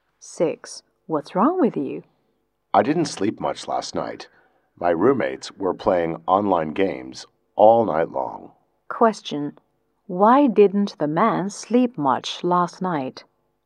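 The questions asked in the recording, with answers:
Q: Why didn't the man sleep much last night?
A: His roommates played online games all night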